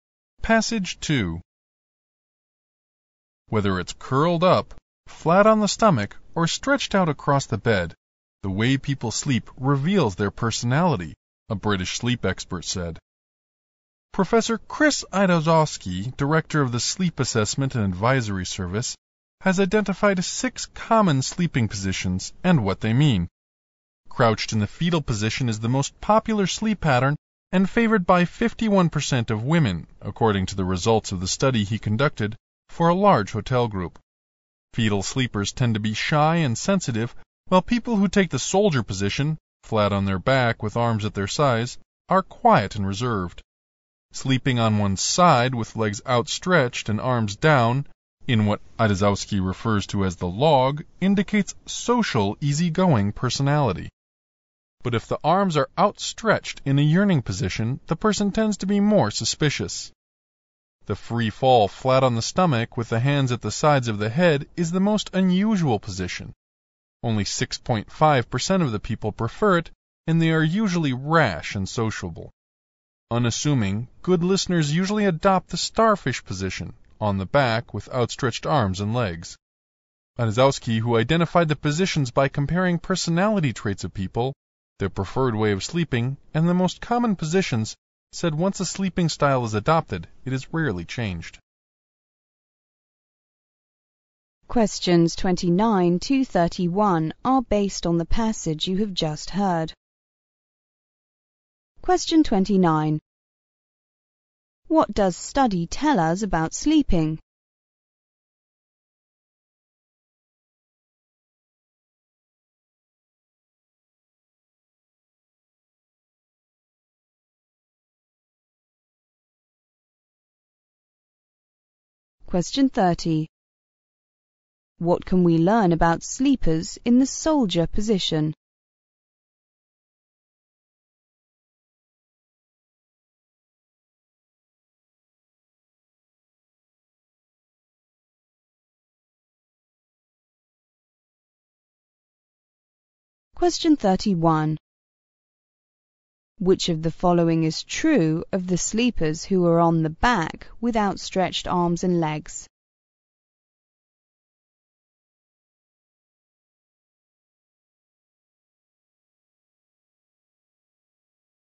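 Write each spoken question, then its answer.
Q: What does study tell us about sleeping?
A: The way people sleep reveals their personality

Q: What can we learn about sleepers in the soldier position?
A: They are quiet and reserved

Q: Which of the following is true of the sleepers who are on the back with outstretched arms and legs?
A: They are unassuming, good listeners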